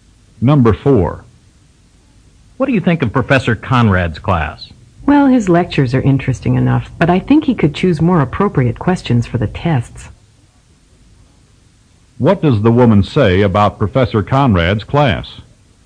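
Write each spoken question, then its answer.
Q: What does the woman say about Professor Conrad's class?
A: The lectures are interesting, but the test questions could be more appropriate.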